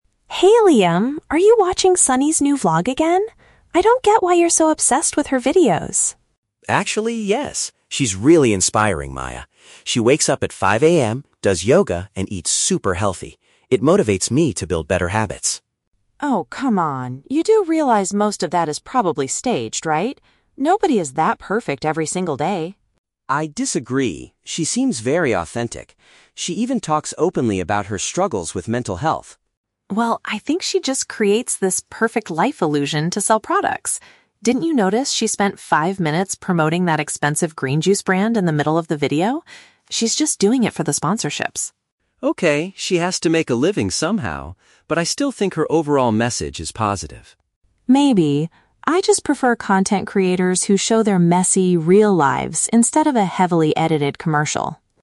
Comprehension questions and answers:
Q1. What does Liam like most about the vlogger?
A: Her videos encourage him to improve his own daily routine.

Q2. Why does Maya criticize the vlogger?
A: She believes the vlogger's lifestyle is fake and made for advertising.

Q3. What kind of content creators does Maya prefer to watch?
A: People who share their genuine and unpolished everyday experiences.

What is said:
Maya: Hey Liam, are you watching Sunny's new vlog again? I don't get why you're so obsessed with her videos.
Liam: Actually, yes. She's really inspiring, Maya. She wakes up at 5 AM, does yoga, and eats super healthy. It motivates me to build better habits.
Maya: Oh, come on. You do realize most of that is probably staged, right? Nobody is that perfect every single day.
Liam: I disagree. She seems very authentic. She even talks openly about her struggles with mental health.
Maya: Well, I think she just creates this 'perfect life' illusion to sell products. Didn't you notice she spent five minutes promoting that expensive green juice brand in the middle of the video? She's just doing it for the sponsorships.
Liam: Okay, she has to make a living somehow. But I still think her overall message is positive.
Maya: Maybe. I just prefer content creators who show their messy, real lives instead of a heavily edited commercial.